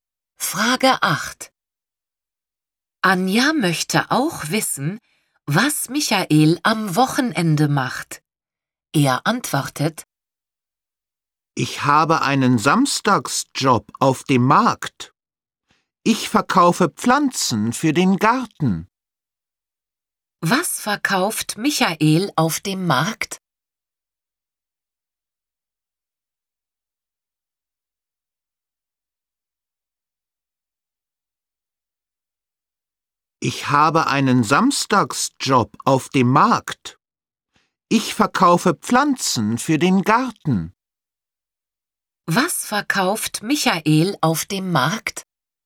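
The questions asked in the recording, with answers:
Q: Was verkauft Michael auf dem Markt?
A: Pflanzen für den Garten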